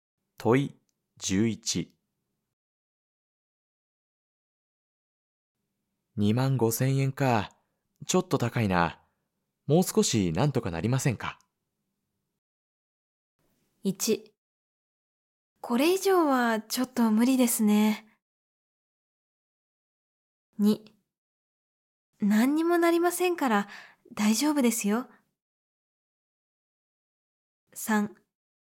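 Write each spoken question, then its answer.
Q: 25,000円か、ちょっと高いな。もう少しなんとかなりませんか?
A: 1: これ以上はちょっと無理ですね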